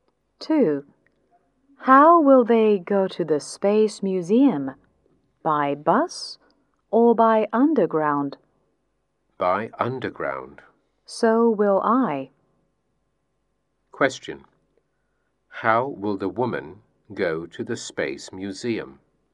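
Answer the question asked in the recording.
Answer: By underground.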